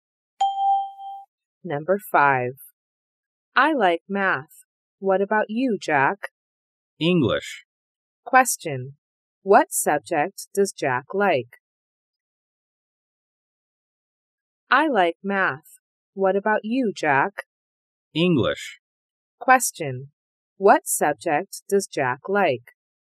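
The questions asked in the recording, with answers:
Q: What subject does Jack like?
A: English.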